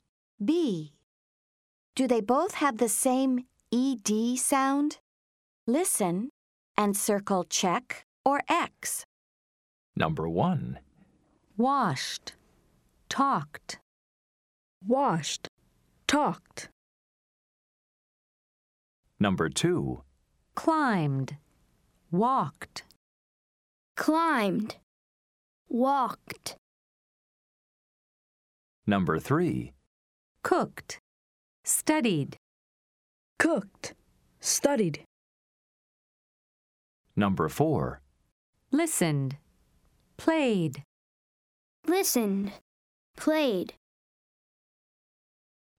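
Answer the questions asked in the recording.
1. Yes (washed, talked: both /t/)
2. No (climbed /d/, walked /t/)
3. No (cooked /t/, studied /d/)
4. Yes (listened, played: both /d/)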